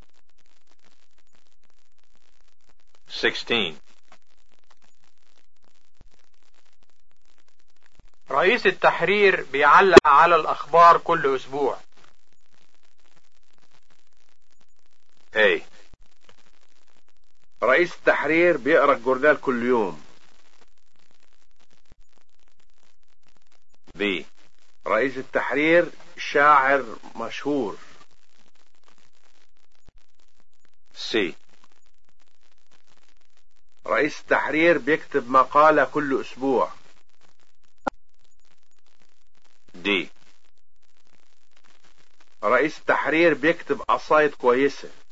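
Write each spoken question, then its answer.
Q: رئيس التحرير بيعلق على الأخبار كل أسبوع.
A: C: رئيس التحرير بيكتب مقالة كل أسبوع.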